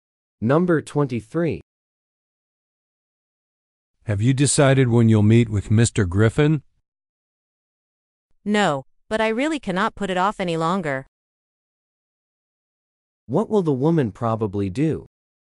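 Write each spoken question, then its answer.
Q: What will the woman probably do?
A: Meet Mr. Griffin soon.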